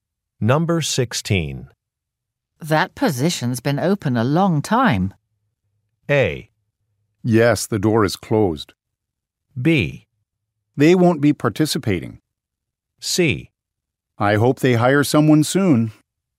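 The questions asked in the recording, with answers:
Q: That position's been open a long time.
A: C: I hope they hire someone soon.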